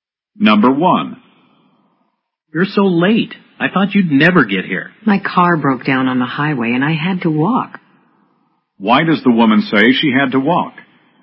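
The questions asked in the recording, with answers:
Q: Why does the woman say she had to walk?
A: Her car broke down on the highway.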